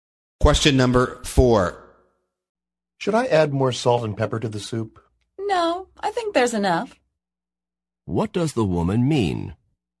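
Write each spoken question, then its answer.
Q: What does the woman mean?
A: The soup doesn't need more salt and pepper.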